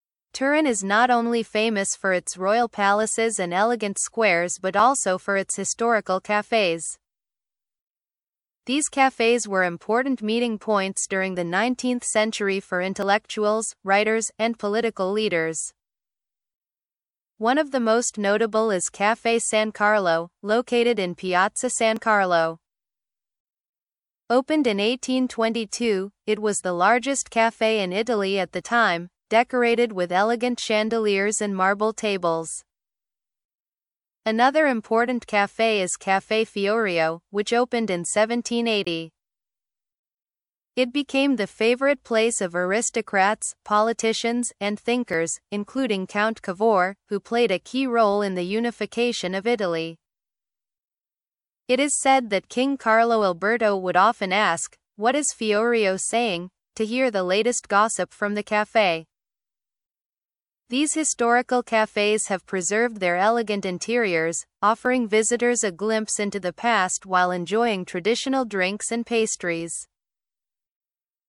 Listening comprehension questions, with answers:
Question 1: What role did Turin's cafés play in the 19th century?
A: Turin's cafés were meeting points for intellectuals, writers, and political leaders.

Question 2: When was Caffè San Carlo opened?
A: Caffè San Carlo was opened in 1822.

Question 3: Why was Caffè San Carlo famous in the 19th century?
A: Caffè San Carlo was the largest café in Italy at the time and was famous for its elegant chandeliers and marble tables.

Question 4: Which café did Count Cavour frequent, and why is it important?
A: Count Cavour frequented Caffè Fiorio, which became a hub for politicians and aristocrats.

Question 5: What did King Carlo Alberto ask about Caffè Fiorio?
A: King Carlo Alberto would ask, «What is Fiorio saying?» to hear the latest gossip.

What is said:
Turin is not only famous for its royal palaces and elegant squares but also for its historical cafés. These cafés were important meeting points during the 19th century for intellectuals, writers, and political leaders. One of the most notable is Caffè San Carlo, located in Piazza San Carlo. Opened in 1822, it was the largest café in Italy at the time, decorated with elegant chandeliers and marble tables.
Another important café is Caffè Fiorio, which opened in 1780. It became the favorite place of aristocrats, politicians, and thinkers, including Count Cavour, who played a key role in the unification of Italy. It is said that King Carlo Alberto would often ask, "What is Fiorio saying?" to hear the latest gossip from the café.
These historical cafés have preserved their elegant interiors, offering visitors a glimpse into the past while enjoying traditional drinks and pastries.